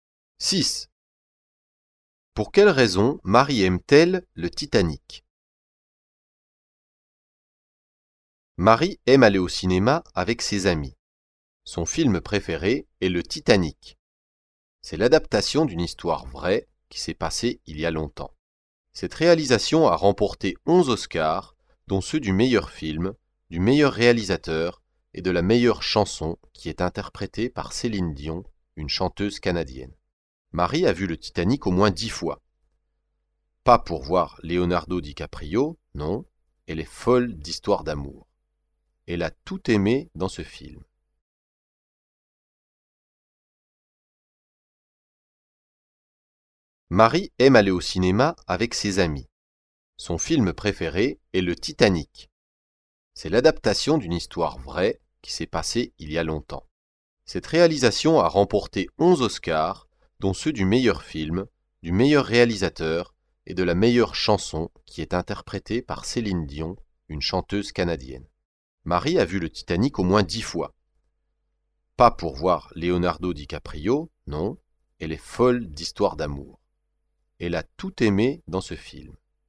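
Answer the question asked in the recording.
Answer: Elle est folle d'histoires d'amour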